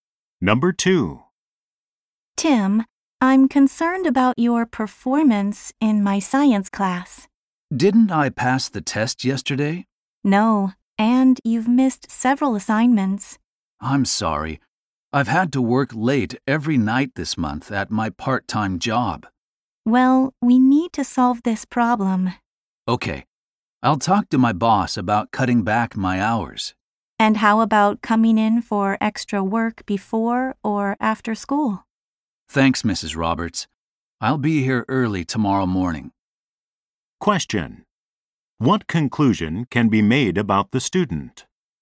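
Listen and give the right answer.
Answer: He is doing badly in science because his part-time job keeps him working late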